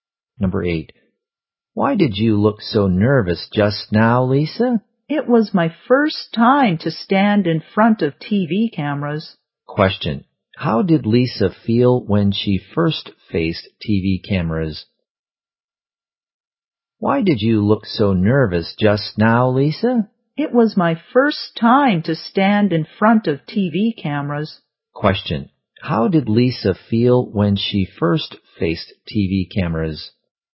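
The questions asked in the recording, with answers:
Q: Question. How did Lisa feel when she first faced TV cameras?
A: Nervous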